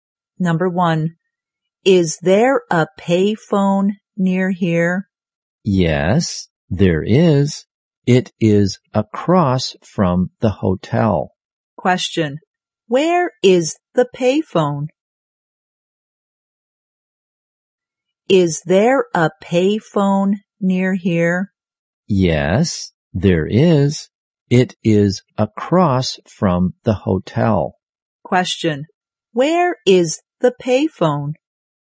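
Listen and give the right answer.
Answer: Across from the hotel.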